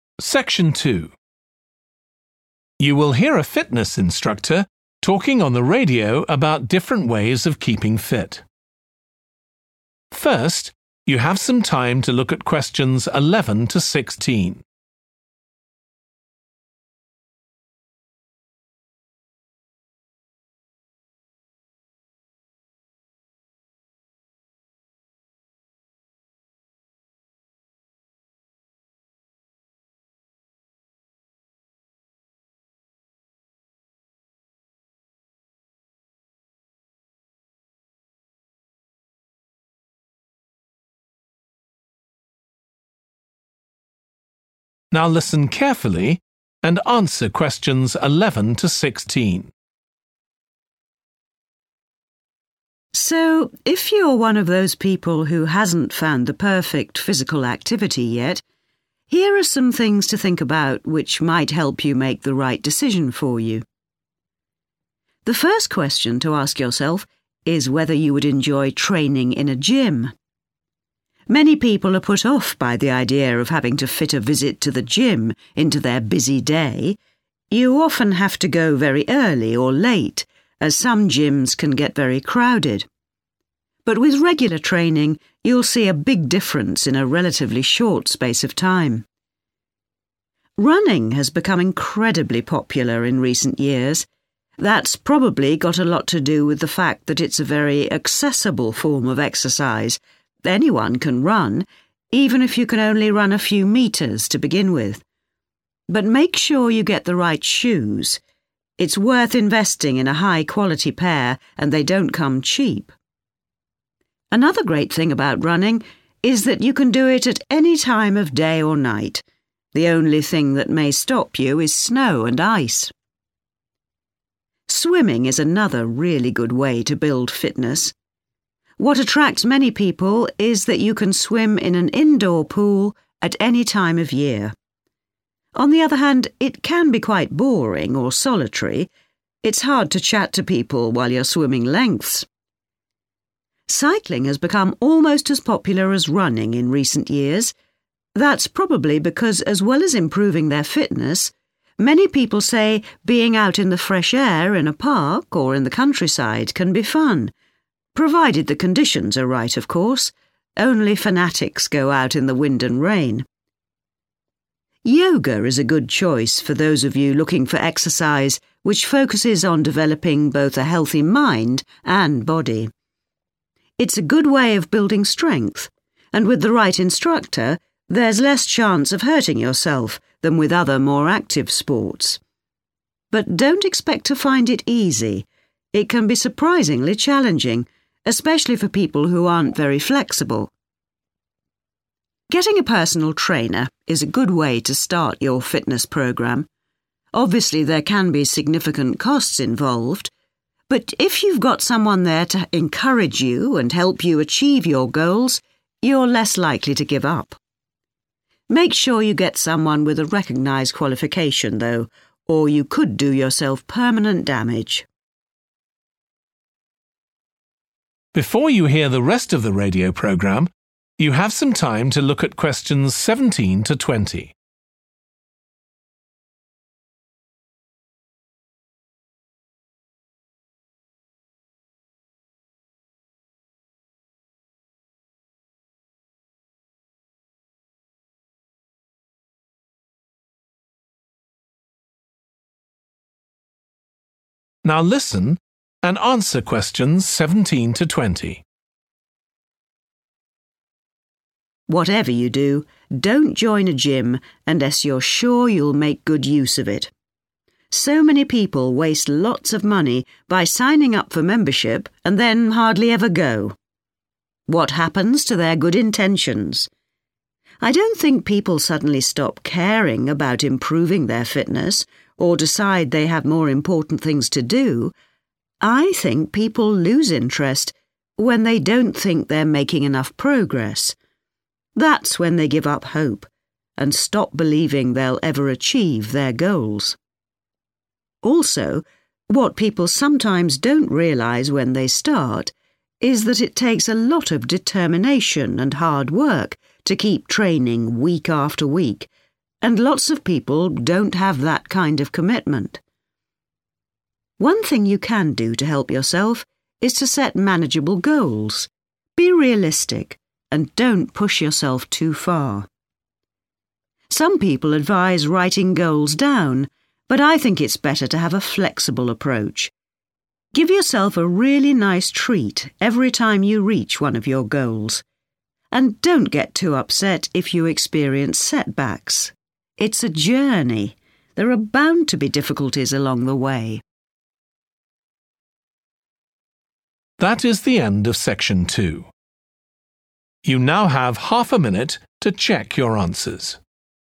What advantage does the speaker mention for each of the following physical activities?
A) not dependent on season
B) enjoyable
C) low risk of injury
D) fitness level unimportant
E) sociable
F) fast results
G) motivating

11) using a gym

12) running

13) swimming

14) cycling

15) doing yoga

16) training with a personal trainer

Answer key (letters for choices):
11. F
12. D
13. A
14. B
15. C
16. G

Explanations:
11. but with regular training you'll see a big difference in a relatively short space of time. Excerpt/Transcript Explanation: The transcript is saying that if you exercise regularly, you will notice a significant improvement in a short amount of time. Answer Explanation: The answer means that you can expect to see quick results if you work out at a gym. Reason For Correctness: The correct answer is 'F' because the excerpt highlights that consistent training at a gym will lead to noticeable improvements in a short period, indicating fast results as an advantage of using a gym for physical activity.
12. that it's a very accessible form of exercise that anyone can run even if you could only run a few meters to begin with. Excerpt/Transcript Explanation: The transcript talks about running as an exercise that anyone can do, even if they can only run a short distance at first. Answer Explanation: The answer 'D' means that fitness level is unimportant when it comes to the activity mentioned (running). Reason For Correctness: The correct answer is 'D' because the excerpt states that running is accessible to anyone, regardless of their fitness level. This implies that you don't need to be in a certain level of fitness to start running, highlighting that fitness level is unimportant for this activity.
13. What attracts many people is that you can swim in an indoor pool at any time of year. Excerpt/Transcript Explanation: The transcript mentions that many people are attracted to swimming because they can do it in an indoor pool at any time of year. Answer Explanation: The answer choice 'A - not dependent on season' means that swimming can be done year-round regardless of the weather or season. Reason For Correctness: The correct answer is 'A' because the excerpt clearly states that swimming can be enjoyed in an indoor pool at any time of year, indicating that it is not dependent on the season.
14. many people say being out in the fresh air in a park or in the countryside can be fun Excerpt/Transcript Explanation: The transcript mentions that many people find it enjoyable to be outdoors in a park or countryside. Answer Explanation: The answer choice 'B' means that cycling is enjoyable. Reason For Correctness: The correct answer is supported by the information in the excerpt where it states that being out in the fresh air in a park or countryside is fun. This aligns with the idea that cycling can be an enjoyable activity for many people.
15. Make sure you get someone with a recognised qualification though. Or you could do yourself permanent damage. Excerpt/Transcript Explanation: The transcript advises making sure to find a person who has a recognized qualification for doing yoga to avoid causing permanent damage to yourself. Answer Explanation: The answer indicates that doing yoga has a low risk of injury. Reason For Correctness: The correct answer is 'C - low risk of injury' because the excerpt warns about the importance of choosing a qualified person for yoga to prevent permanent damage, implying that yoga is a physical activity with a low likelihood of causing harm when done correctly.
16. The transcript talks about how having a personal trainer can be helpful when starting a fitness program. They mention that there could be costs involved in getting a personal trainer, but having someone to support and motivate you can prevent you from giving up. Answer Explanation: The answer means that having a personal trainer can be motivating. This means that they can encourage and inspire you to continue with your fitness program. Reason For Correctness: The correct answer is 'G' because the excerpt states that having a personal trainer can provide encouragement and help in achieving fitness goals, making it motivating for the individual.

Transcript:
So if you are one of those people who hasn't found the perfect physical activity yet, here are some things to think about which might help you make the right decision for you. The first question to ask yourself is whether you would enjoy training in a gym. Many people are put off by the idea of having to fit a visit to the gym into their busy day. You often have to go very early or late as some gyms can get very crowded but with regular training you'll see a big difference in a relatively short space of time.
Running has become incredibly popular in recent years. That's probably got a lot to do with the fact that it's a very accessible form of exercise that anyone can run even if you could only run a few meters to begin with. But make sure you get the right shoes. It's worth investing in a high quality pair and they don't come cheap. Another great thing about running is that you can do it at any time of day or night. The only thing that may stop you is snow and ice.
Swimming is another really good way to build fitness. What attracts many people is that you can swim in an indoor pool at any time of year. On the other hand, it can be quite boring or solitary. It's hard to chat to people while you're swimming lengths.
Cycling has become almost as popular as running in recent years. That's probably because as well as improving their fitness many people say being out in the fresh air in a park or in the countryside can be fun, provided the conditions are right of course. Only fanatics go out in the wind and rain.
Yoga is a good choice for those of you looking for exercise, which focuses on developing both a healthy mind and body. It's a good way of building strength and with the right instructor there's less chance of hurting yourself than with other more active sports. But don't expect to find it easy. It can be surprisingly challenging, especially for people who aren't very flexible. Getting a personal trainer is a good way to start your fitness program. Obviously there can be significant costs involved. But if you've got someone there to encourage you and help you achieve your goals, you're less likely to give up. Make sure you get someone with a recognised qualification though. Or you could do yourself permanent damage.
Whatever you do, don't join a gym and you're sure you'll make good use of it. So many people waste lots of money by signing up for membership and then hardly ever go. What happens to their good intentions? I don't think people suddenly stop caring about improving their fitness or decide they have more important things to do. I think people lose interest when they don't think they're making enough progress. That's when they give up hope and stop believing they'll ever achieve their goals. Also, what people sometimes don't realize when they start is that it takes a lot of determination and hard work to keep training week after week, and lots of people don't have that kind of commitment. One thing you can do to help yourself is to set manageable goals, be realistic and don't push yourself too far. Some people advise writing goes down but I think it's better to have a flexible approach. Give yourself a really nice treat every time you reach one of your goals and don't get too upset if you experience setbacks. It's a journey. There are bound to be difficulties along the way.